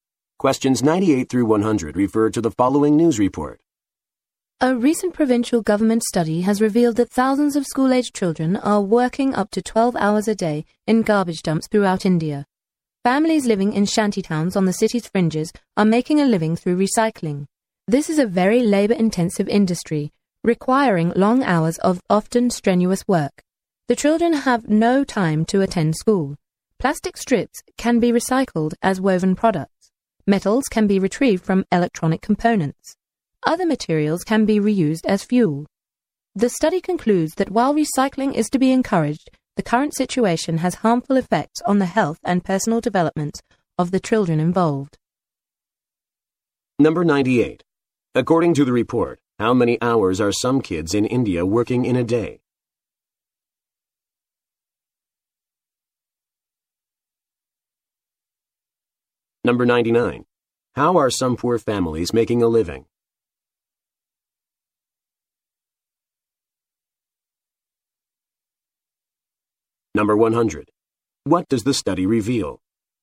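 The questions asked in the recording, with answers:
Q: According to the report, how many hours are some kids in India working in a day?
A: Up to 12 hours

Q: How are some poor families making a living?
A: Through recycling

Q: What does the study reveal?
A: Thousands of school-aged children work up to 12 hours a day in garbage dumps, harming their health and development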